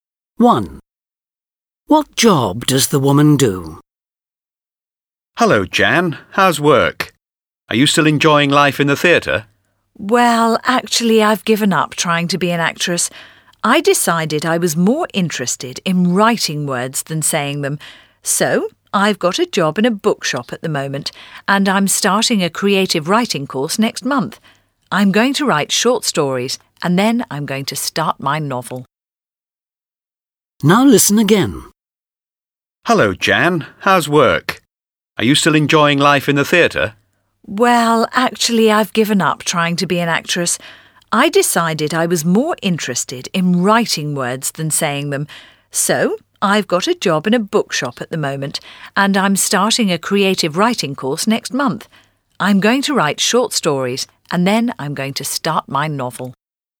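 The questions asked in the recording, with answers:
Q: What job does the woman do?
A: She works in a bookshop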